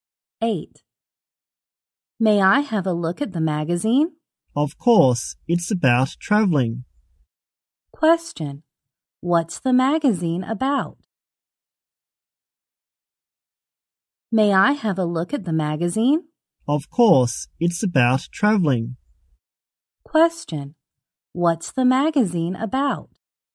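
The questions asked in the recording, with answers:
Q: What's the magazine about?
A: Traveling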